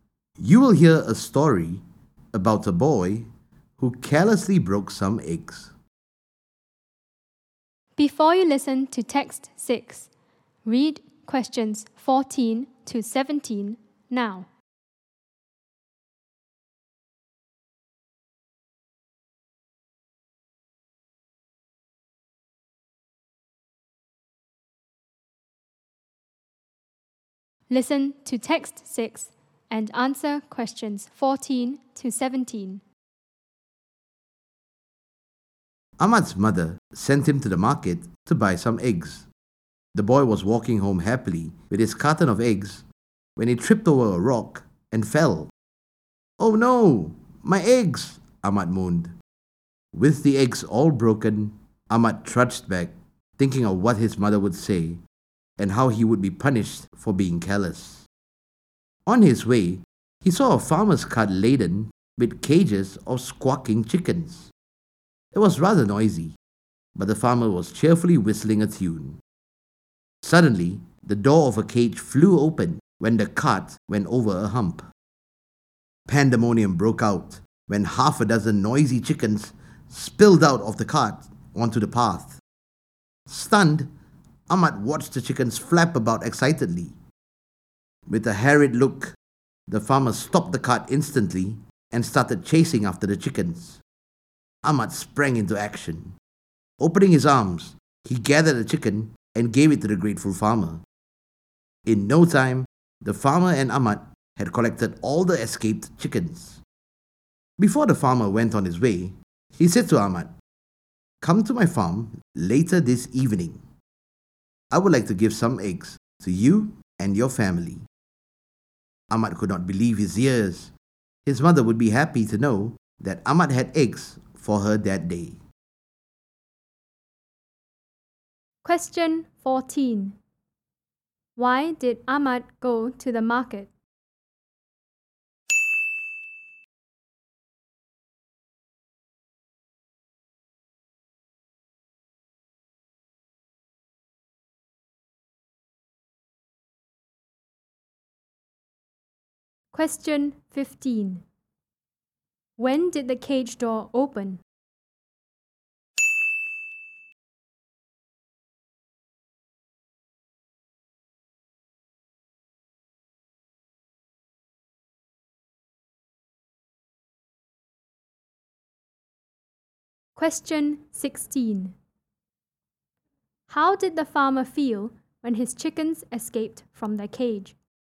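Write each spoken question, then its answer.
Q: Why did Ahmad go to the market?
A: To buy some eggs

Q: When did the cage door open?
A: When the cart went over a hump

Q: How did the farmer feel when his chickens escaped from their cage?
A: Harried (stressed and worried)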